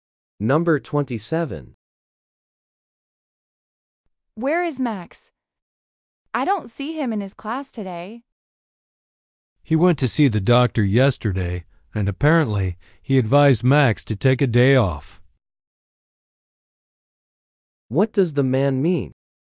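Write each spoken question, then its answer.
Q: What does the man mean?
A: Max is sick and resting at home.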